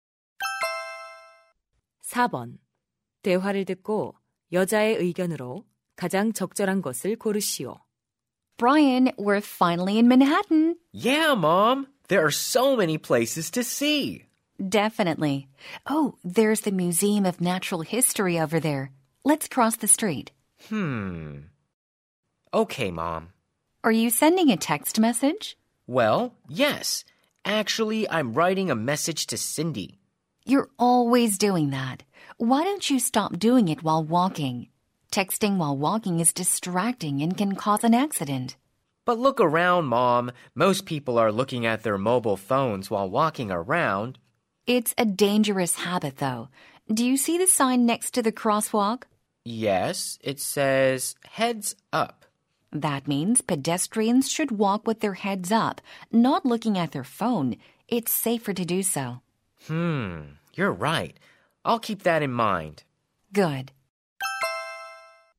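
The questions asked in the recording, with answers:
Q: 대화를 듣고 여자의 의견으로 가장 적절한 것을 고르시오.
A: 걸으면서 문자를 보내는 것은 위험하다.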